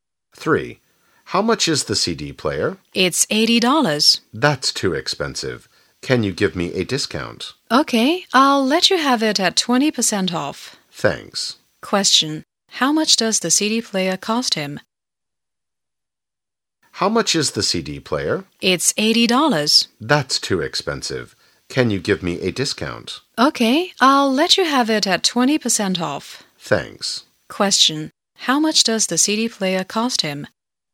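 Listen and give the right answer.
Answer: $64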